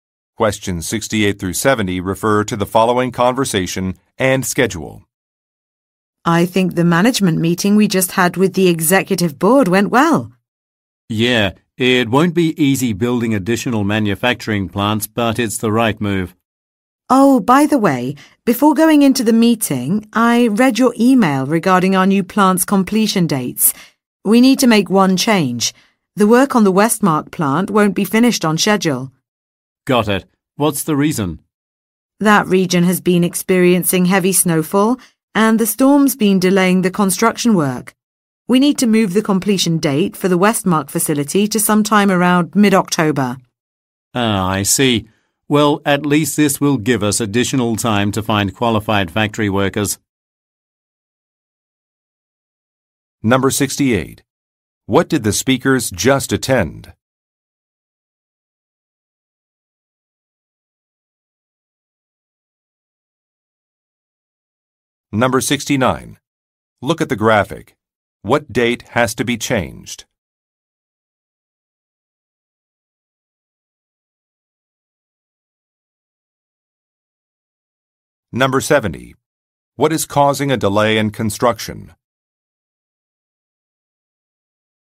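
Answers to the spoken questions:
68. A management meeting with the executive board
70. Heavy snowfall / storms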